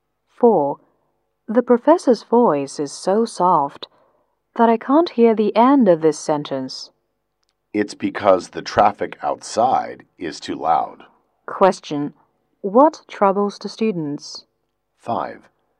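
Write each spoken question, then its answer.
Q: Question,What troubles the students?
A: The loud traffic noise outside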